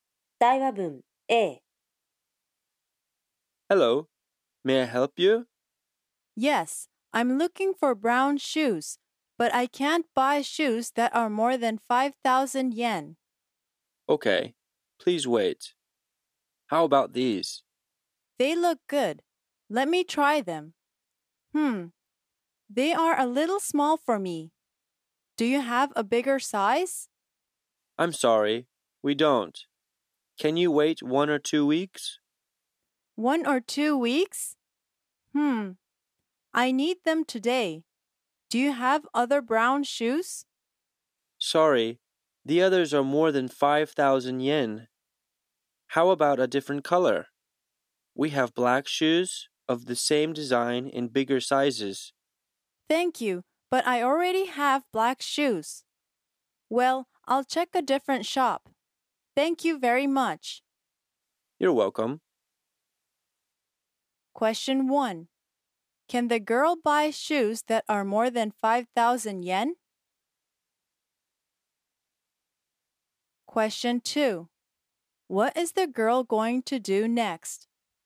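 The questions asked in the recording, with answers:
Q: Can the girl buy shoes that are more than 5,000 yen?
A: No, she can't.

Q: What is the girl going to do next?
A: She is going to check a different shop.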